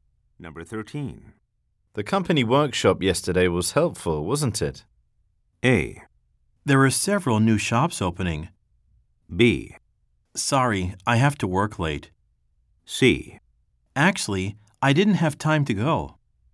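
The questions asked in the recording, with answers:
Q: The company workshop yesterday was helpful, wasn't it?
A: C: Actually, I didn't have time to go.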